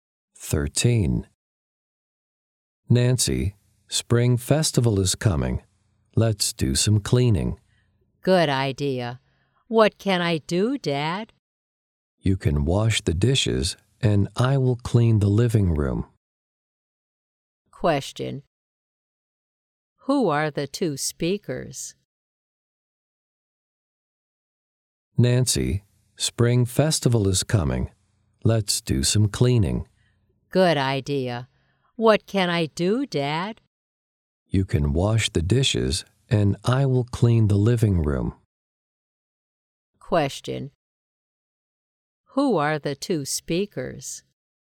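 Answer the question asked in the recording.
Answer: A father and his daughter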